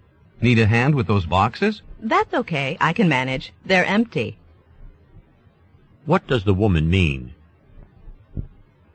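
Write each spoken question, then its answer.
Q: What does the woman mean?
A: She doesn't need help; the boxes are empty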